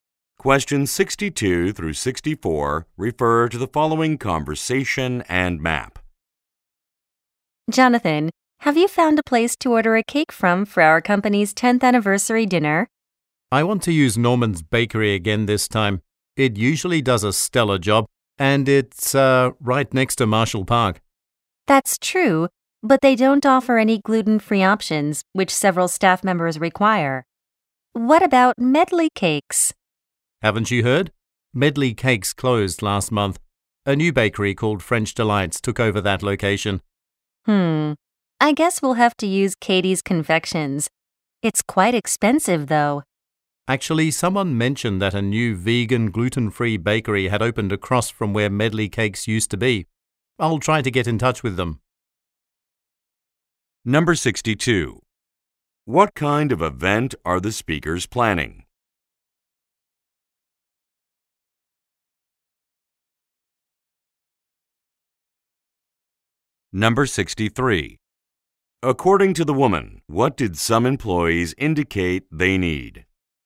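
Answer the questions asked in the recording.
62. A company anniversary dinner
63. Gluten-free options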